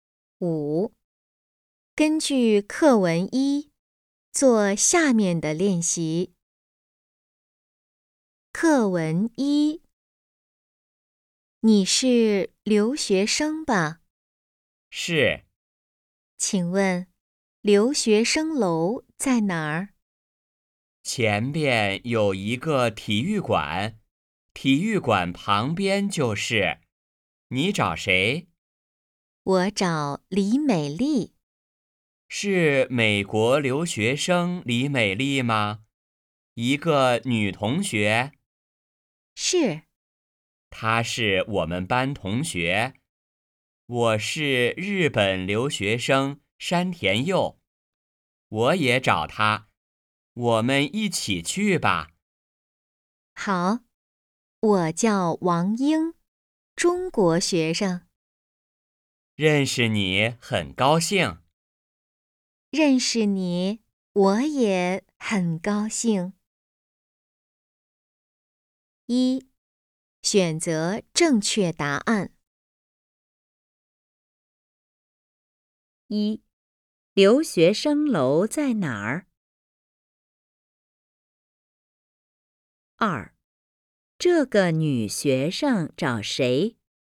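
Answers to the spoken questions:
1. 体育馆旁边
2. 李美丽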